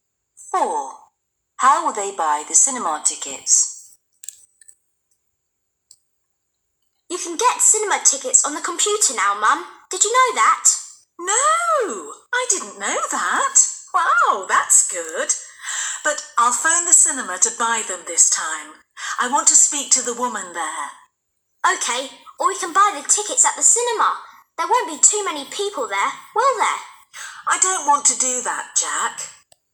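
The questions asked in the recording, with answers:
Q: How will they buy the cinema tickets?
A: by phoning the cinema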